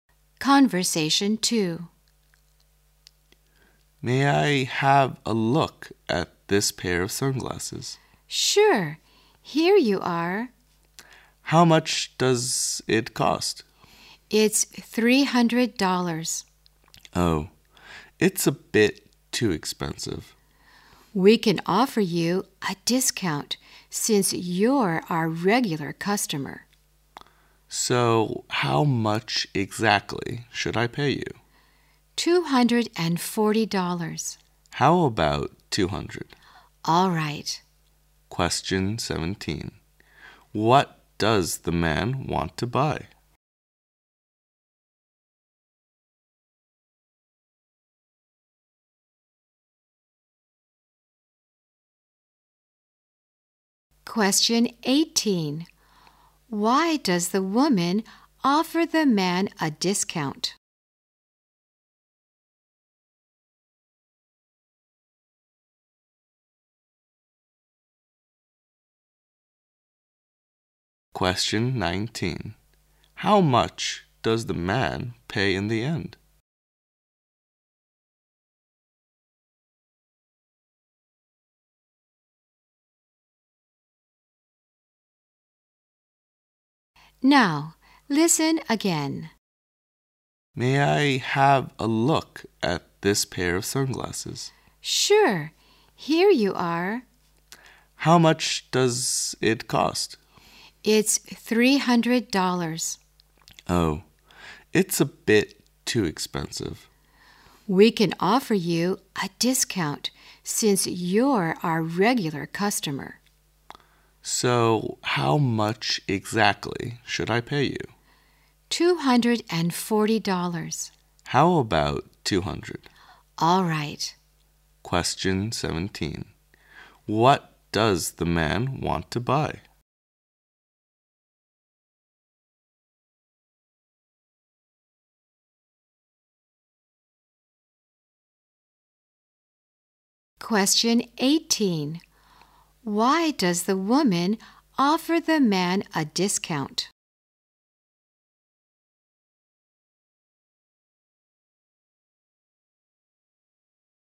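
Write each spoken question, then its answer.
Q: What does the man want to buy?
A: A pair of sunglasses

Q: Why does the woman offer the man a discount?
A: He is a regular customer

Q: How much does the man pay in the end?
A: $200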